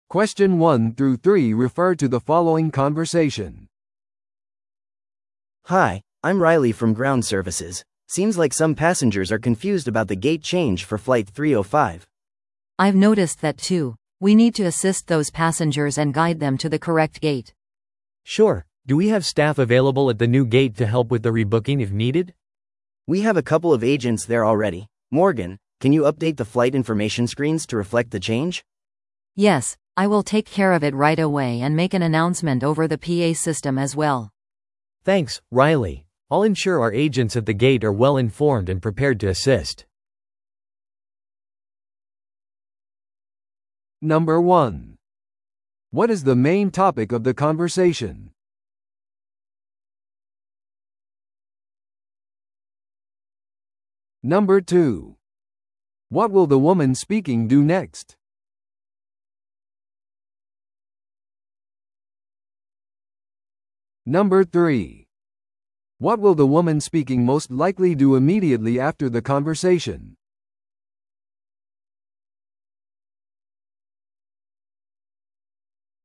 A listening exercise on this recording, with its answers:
Listen to the audio below and answer the questions.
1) What is the main topic of the conversation?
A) グラウンドスタッフの安全手順の確認。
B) 乗客の旅程の更新。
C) 新しいフライトのスタッフのスケジューリング。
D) ゲート変更に関する混乱の対応。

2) What will the woman speaking do next?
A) ゲートで乗客のチケットを確認する。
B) 乗客を飛行機の座席まで案内する。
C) 情報スクリーンを更新してアナウンスする。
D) カスタマーサービスデスクで乗客をリブッキングする。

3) What will the woman speaking most likely do immediately after the conversation?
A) グラウンドサービスのスーパーバイザーと話す。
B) 新しいゲートでエージェントを手伝う。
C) 他にゲートの変更がないか確認する。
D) フライト情報を更新して公的なアナウンスを行う。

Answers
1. D
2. C
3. D

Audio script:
A: Hi, I'm Riley from ground services. Seems like some passengers are confused about the gate change for Flight 305.
B: I've noticed that too. We need to assist those passengers and guide them to the correct gate.
C: Sure. Do we have staff available at the new gate to help with the rebooking if needed?
A: We have a couple of agents there already. Morgan, can you update the flight information screens to reflect the change?
B: Yes, I will take care of it right away and make an announcement over the PA system as well.
C: Thanks, Riley. I'll ensure our agents at the gate are well-informed and prepared to assist.

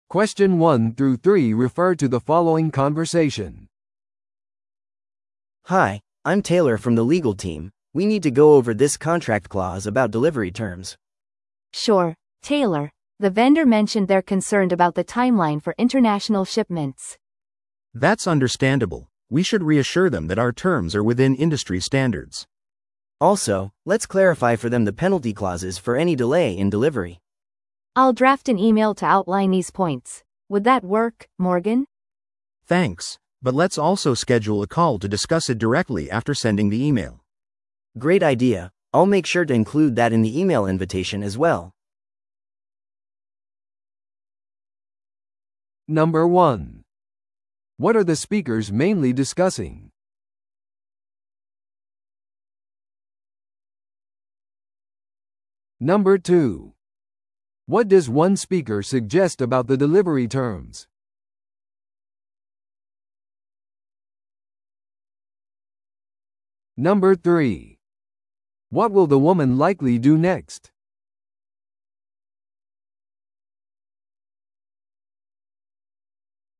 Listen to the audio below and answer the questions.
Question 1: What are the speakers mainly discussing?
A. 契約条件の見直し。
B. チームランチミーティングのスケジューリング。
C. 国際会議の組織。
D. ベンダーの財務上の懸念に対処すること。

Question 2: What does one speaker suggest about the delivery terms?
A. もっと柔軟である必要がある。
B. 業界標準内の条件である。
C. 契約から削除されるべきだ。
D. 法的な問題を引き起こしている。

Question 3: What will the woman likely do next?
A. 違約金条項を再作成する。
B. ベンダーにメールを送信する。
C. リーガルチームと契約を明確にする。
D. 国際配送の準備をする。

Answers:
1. A
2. B
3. B

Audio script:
A: Hi, I'm Taylor from the legal team. We need to go over this contract clause about delivery terms.
B: Sure, Taylor. The vendor mentioned they're concerned about the timeline for international shipments.
C: That's understandable. We should reassure them that our terms are within industry standards.
A: Also, let's clarify for them the penalty clauses for any delay in delivery.
B: I'll draft an email to outline these points. Would that work, Morgan?
C: Thanks, but let's also schedule a call to discuss it directly after sending the email.
A: Great idea. I'll make sure to include that in the email invitation as well.

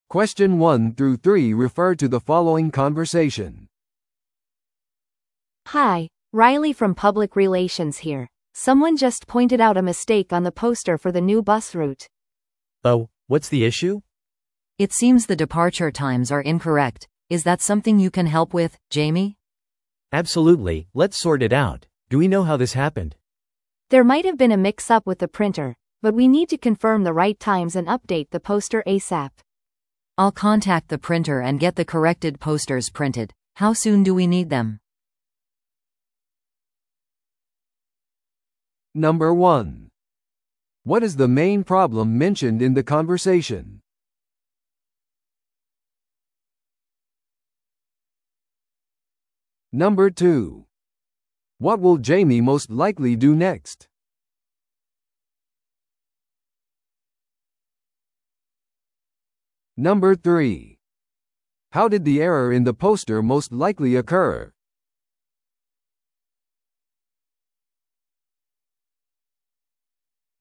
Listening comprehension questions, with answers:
Listen to the audio below and answer the questions.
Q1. What is the main problem mentioned in the conversation?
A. バスルートがキャンセルされました。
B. 新しいバスルートが登場します。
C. ポスター上の出発時刻が間違っています。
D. 印刷業者はポスターの印刷に失敗しました。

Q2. What will Jamie most likely do next?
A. 新しいバス路線チームに確認する。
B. バスのサービスに関して公に話す。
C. ポスター上の出発時刻を訂正する作業を行う。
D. バス路線のプレスリリースを組織する。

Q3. How did the error in the poster most likely occur?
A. デザイナーがタイポをしました。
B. 印刷業者が詳細を混同しました。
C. バス会社との連絡が取れませんでした。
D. 印刷の後にルートの時間が変更されました。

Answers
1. C
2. C
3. B

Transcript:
A: Hi, Riley from public relations here. Someone just pointed out a mistake on the poster for the new bus route.
B: Oh? What's the issue?
C: It seems the departure times are incorrect. Is that something you can help with, Jamie?
B: Absolutely, let's sort it out. Do we know how this happened?
A: There might have been a mix-up with the printer, but we need to confirm the right times and update the poster ASAP.
C: I'll contact the printer and get the corrected posters printed. How soon do we need them?

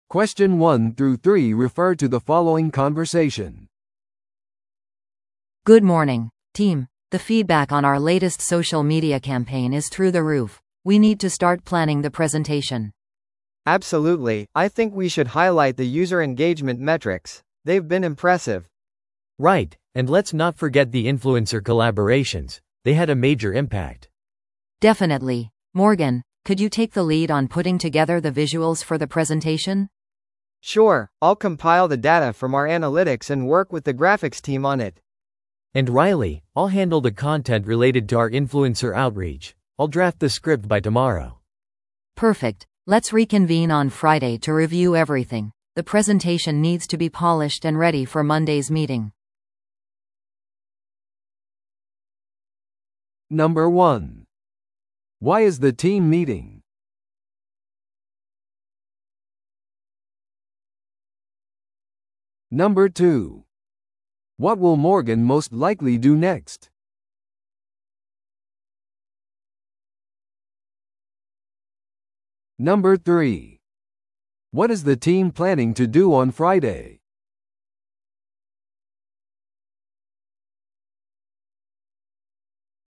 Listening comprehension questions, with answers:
Listen to the audio below and answer the questions.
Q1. Why is the team meeting?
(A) ユーザー参加のデータを分析するため。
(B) ソーシャルメディアでのユーザーからの質問に返答するため。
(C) 今後のプレゼンテーションの準備をするため。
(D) 新しいキャンペーンのアイデアをブレインストーミングするため。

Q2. What will Morgan most likely do next?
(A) チームとプレゼンテーションを見直す。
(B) プレゼンテーション用の視覚資料を集める。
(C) さらなるコラボレーションのためにインフルエンサーに連絡する。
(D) プレゼンテーション用の原稿を下書きする。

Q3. What is the team planning to do on Friday?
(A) グラフィックチームと会う。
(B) 次のソーシャルメディアキャンペーンについて話し合う。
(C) プレゼンテーションのための全ての資料を見直す。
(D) ユーザー参加レポートのドラフトを完成させる。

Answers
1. C
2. B
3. C

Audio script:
A: Good morning, team! The feedback on our latest social media campaign is through the roof. We need to start planning the presentation.
B: Absolutely, I think we should highlight the user engagement metrics. They've been impressive.
C: Right, and let's not forget the influencer collaborations. They had a major impact.
A: Definitely. Morgan, could you take the lead on putting together the visuals for the presentation?
B: Sure, I'll compile the data from our analytics and work with the graphics team on it.
C: And Riley, I'll handle the content related to our influencer outreach. I'll draft the script by tomorrow.
A: Perfect. Let's reconvene on Friday to review everything. The presentation needs to be polished and ready for Monday's meeting.

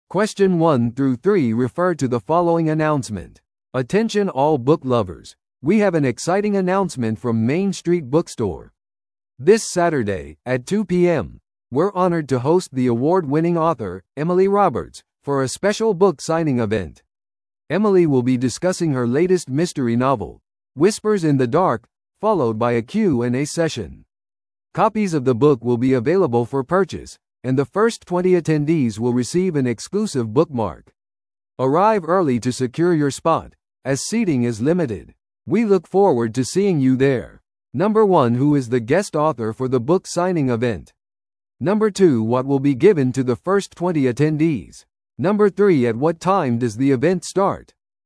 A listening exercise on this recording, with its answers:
Listen to the audio below and answer the questions.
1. Who is the guest author for the book signing event?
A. エミリー・ロバーツ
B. ジョン・スミス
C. サラ・ジョンソン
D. マイク・デイビス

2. What will be given to the first 20 attendees?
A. 特別割引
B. 無料の小説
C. 限定のしおり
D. 個人的な感謝のメモ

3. At what time does the event start?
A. 12pmに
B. 1pmに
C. 2pmに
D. 3pmに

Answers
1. A
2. C
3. C

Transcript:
Attention all book lovers, we have an exciting announcement from Main Street Bookstore! This Saturday, at 2pm, we're honored to host the award-winning author, Emily Roberts, for a special book signing event. Emily will be discussing her latest mystery novel, 'Whispers in the Dark', followed by a Q&A session. Copies of the book will be available for purchase, and the first 20 attendees will receive an exclusive bookmark. Arrive early to secure your spot, as seating is limited. We look forward to seeing you there!

